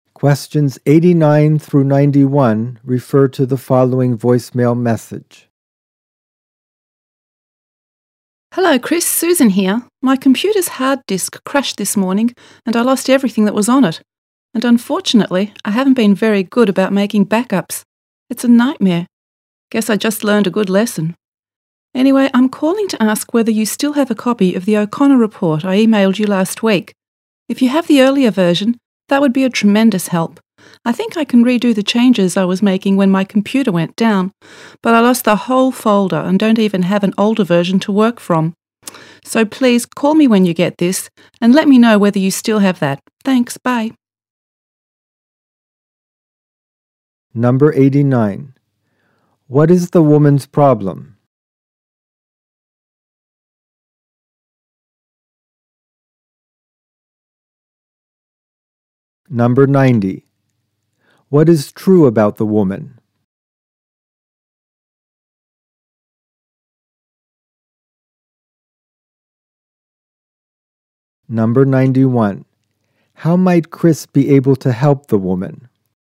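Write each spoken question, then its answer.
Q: What is the woman's problem?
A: Her computer's hard disk crashed and she lost all her files

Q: How might Chris be able to help the woman?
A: By giving her his copy of the O'Connor report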